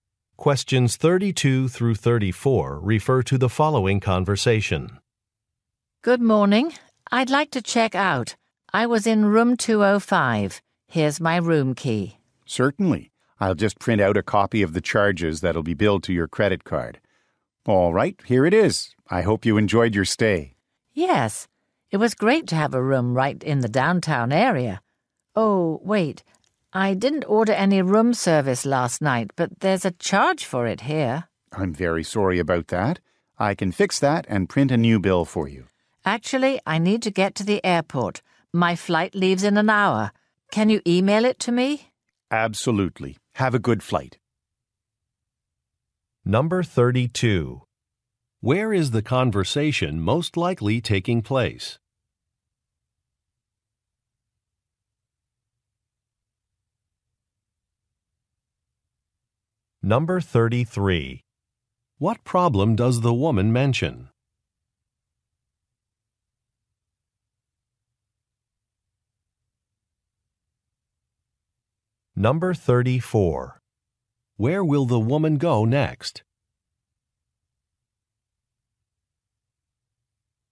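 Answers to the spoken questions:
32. At a hotel
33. She was charged for room service she didn't order
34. To the airport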